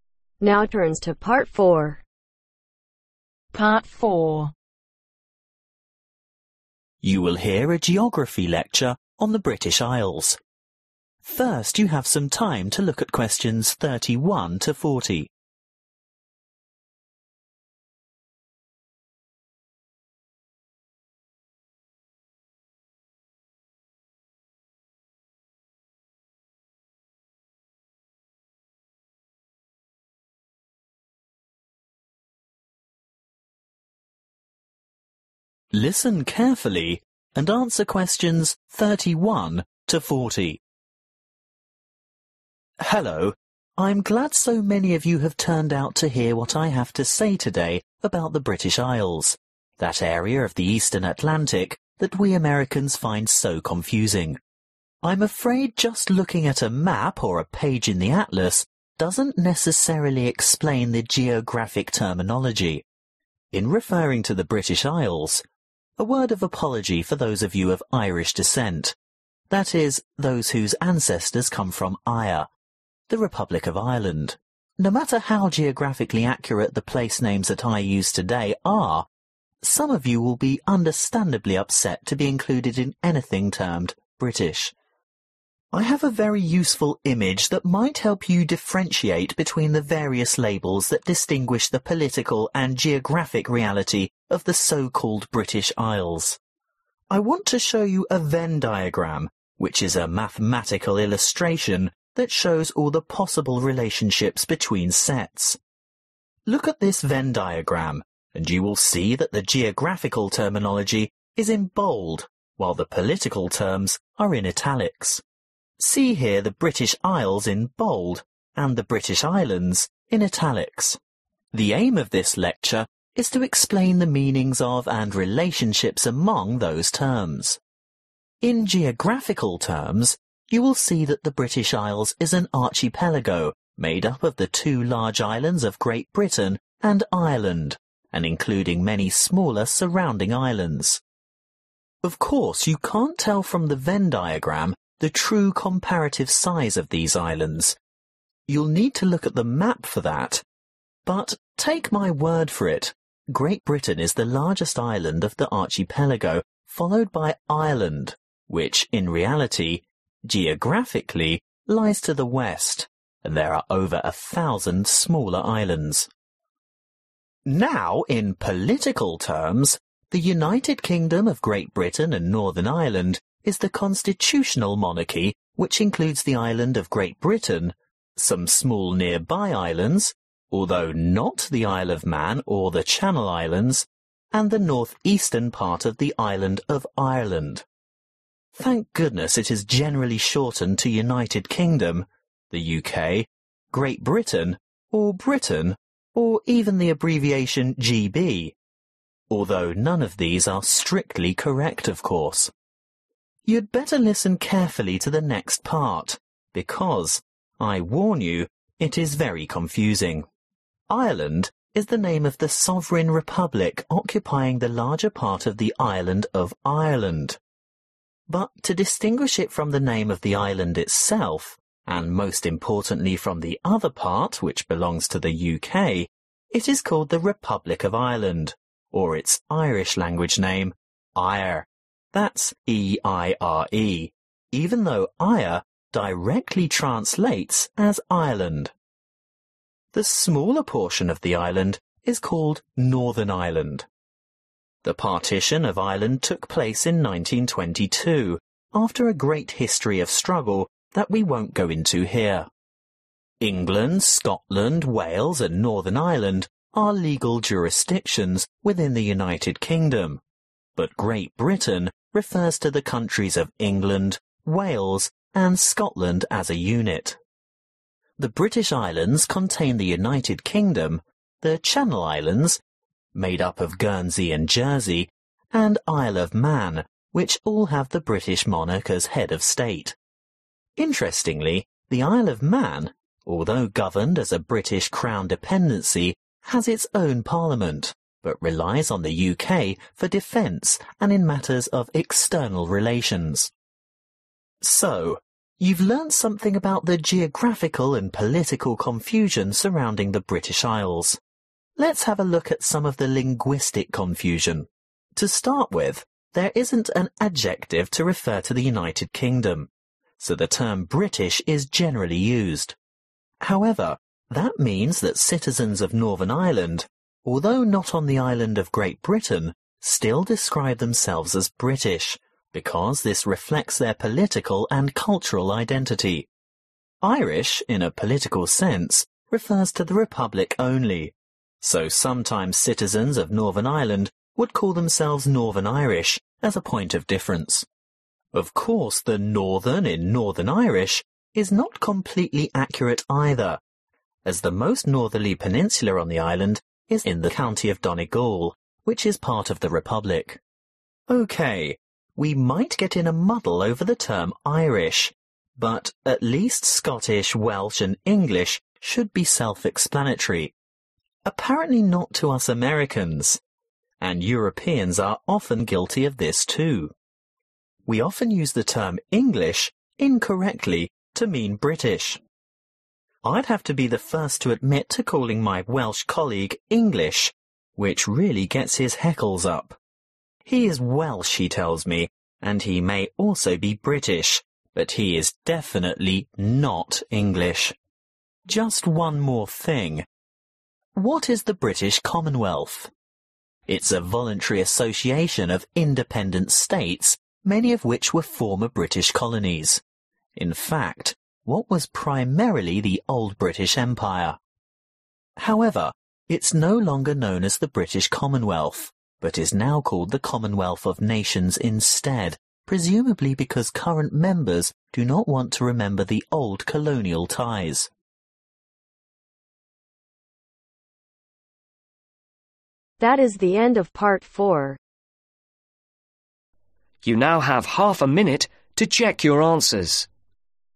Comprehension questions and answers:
Write NO MORE THAN TWO WORDS for each answer.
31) Where are the British isles situated ? In the ....................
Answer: Eastern Atlantic

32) The Venn diagram is used to help students see the difference between geographic and what other regions ?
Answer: Political

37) There is ............ with language also when it comes to describing the British isles.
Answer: Confusion

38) The norther most point of Ireland belongs to the Republican ............. of Donegal.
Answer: County

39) A Welshman will be upset if you call him ..............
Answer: English

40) The former British Empire is now known as the Commonwealth of Nations to avoid recalling previous ............ relationships.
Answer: Colonial